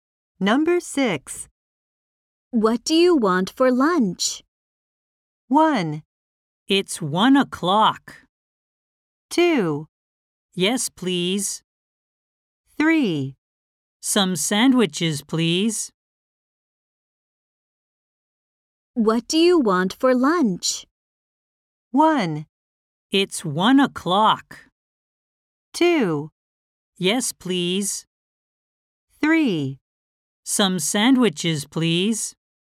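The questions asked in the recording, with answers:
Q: What do you want for lunch?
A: 3: Some sandwiches, please.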